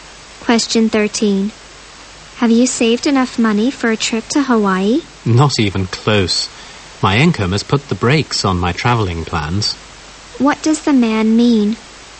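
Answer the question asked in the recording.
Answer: He hasn't saved enough money for the trip because of his income.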